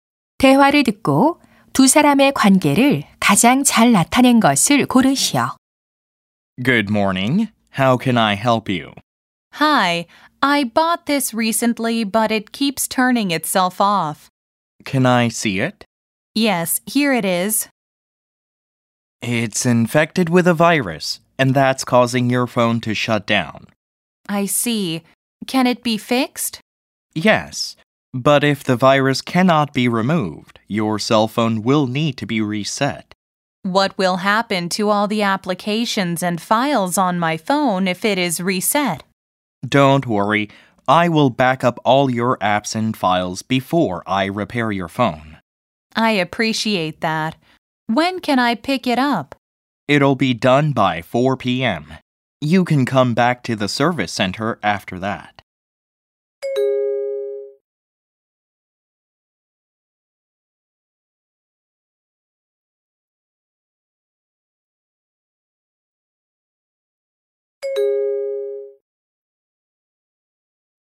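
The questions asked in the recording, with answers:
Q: 대화를 듣고 두 사람의 관계를 가장 잘 나타낸 것을 고르시오.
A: 휴대전화 수리 기사 - 고객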